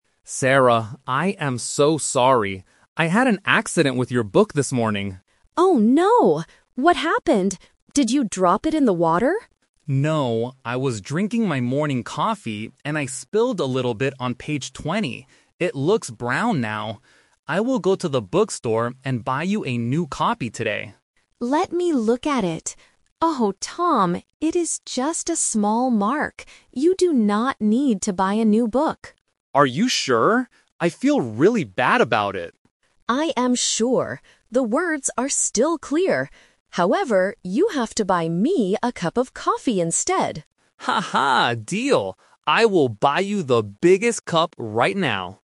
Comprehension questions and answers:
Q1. What happened to Sarah's book?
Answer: It got some coffee on it.

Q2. What did Tom offer to do at first?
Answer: Buy a new copy of the book.

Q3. What does Sarah want Tom to do in the end?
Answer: Buy her a cup of coffee.

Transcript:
Tom: Sarah, I am so sorry. I had an accident with your book this morning.
Sarah: Oh no. What happened? Did you drop it in the water?
Tom: No. I was drinking my morning coffee and I spilled a little bit on page 20. It looks brown now. I will go to the bookstore and buy you a new copy today.
Sarah: Let me look at it. Oh, Tom, it is just a small mark. You do not need to buy a new book.
Tom: Are you sure? I feel really bad about it.
Sarah: I am sure. The words are still clear. However, you have to buy me a cup of coffee instead!
Tom: Haha, deal! I will buy you the biggest cup right now.